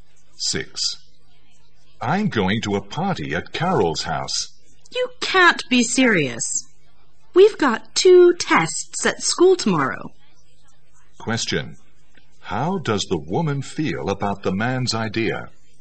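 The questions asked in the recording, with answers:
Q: How does the woman feel about the man's idea?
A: She disapproves of it, since they have two tests tomorrow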